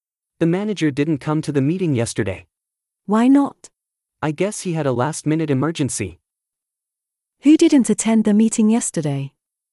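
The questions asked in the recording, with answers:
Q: Who didn't attend the meeting yesterday?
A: The manager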